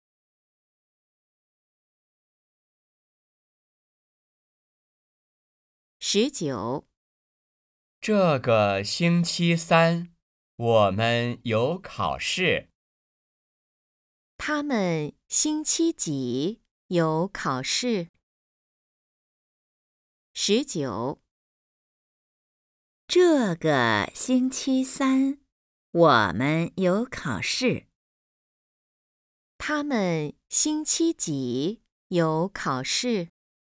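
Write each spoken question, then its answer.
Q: 他们星期几有考试?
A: 星期三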